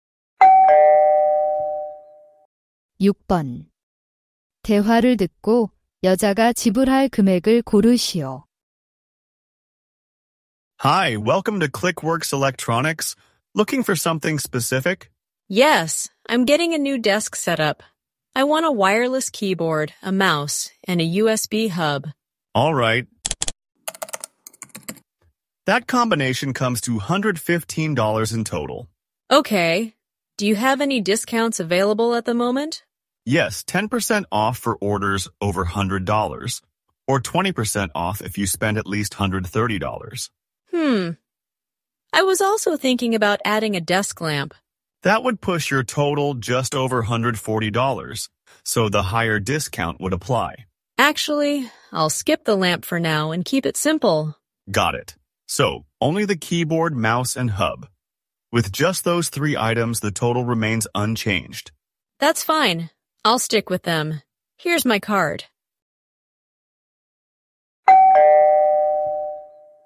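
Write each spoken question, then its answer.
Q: 대화를 듣고 여자가 지불할 금액을 고르시오.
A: $103.50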